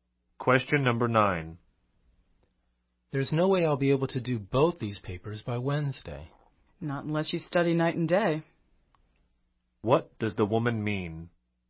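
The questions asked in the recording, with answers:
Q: What does the woman mean?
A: He can only finish both papers if he works very hard, night and day.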